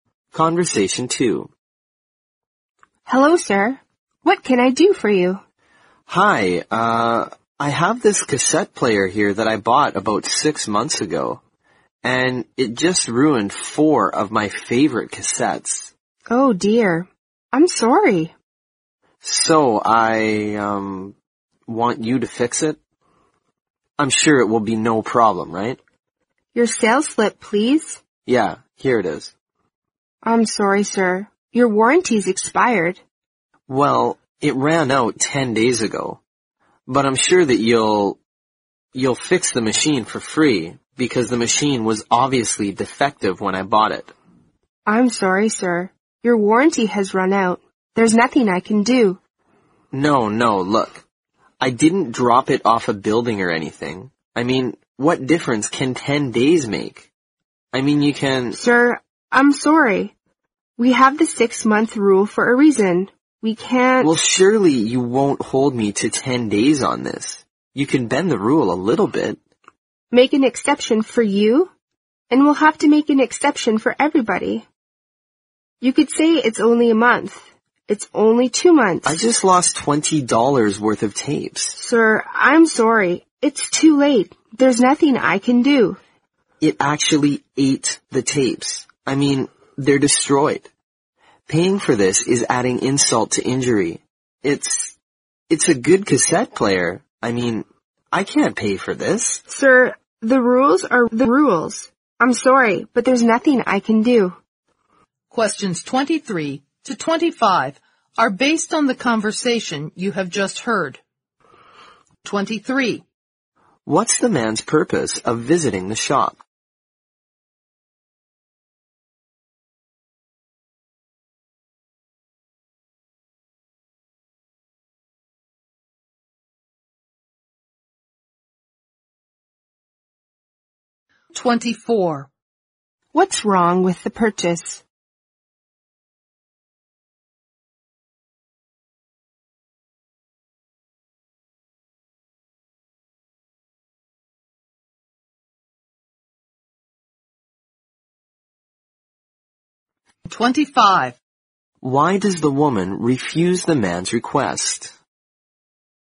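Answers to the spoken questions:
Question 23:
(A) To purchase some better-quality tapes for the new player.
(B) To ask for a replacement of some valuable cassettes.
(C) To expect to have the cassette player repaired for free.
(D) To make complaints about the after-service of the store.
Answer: (C) To expect to have the cassette player repaired for free.
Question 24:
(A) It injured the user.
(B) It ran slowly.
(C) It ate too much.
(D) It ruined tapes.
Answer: (D) It ruined tapes.
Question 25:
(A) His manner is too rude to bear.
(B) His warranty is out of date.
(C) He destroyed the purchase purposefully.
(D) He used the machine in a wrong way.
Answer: (B) His warranty is out of date.

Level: 四级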